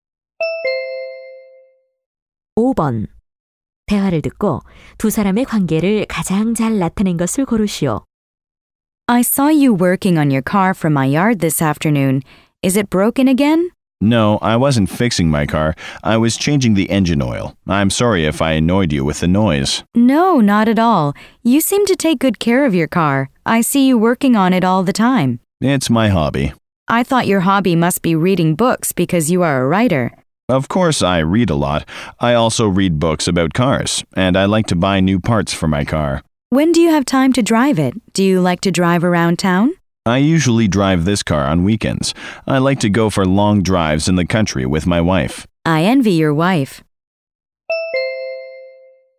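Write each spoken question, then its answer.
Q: 대화를 듣고 두 사람의 관계를 가장 잘 나타낸 것을 고르시오.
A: 이웃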